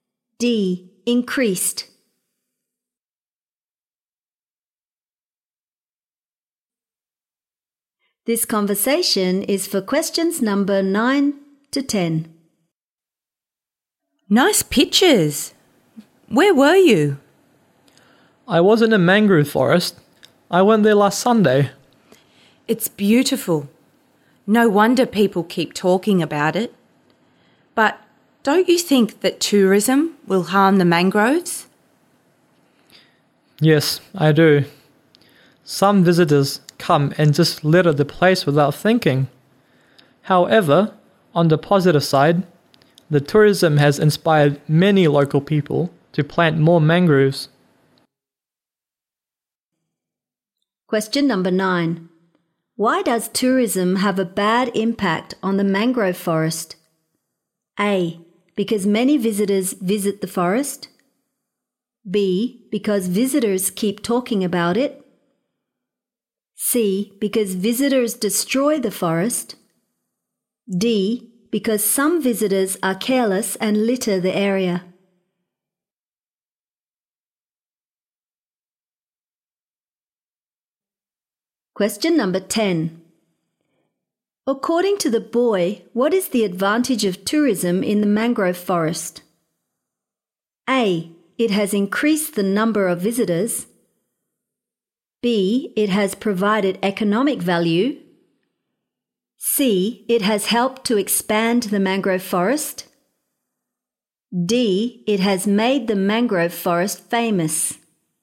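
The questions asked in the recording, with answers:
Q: Why does tourism have a bad impact on the mangrove forest?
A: D: Because some visitors are careless and litter the area.

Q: According to the boy, what is the advantage of tourism in the mangrove forest?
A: C: It has helped to expand the mangrove forest.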